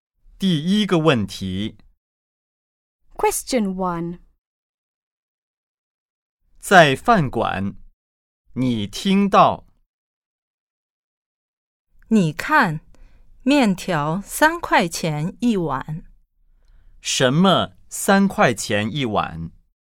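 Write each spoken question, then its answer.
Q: 什么3块钱一碗?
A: 面条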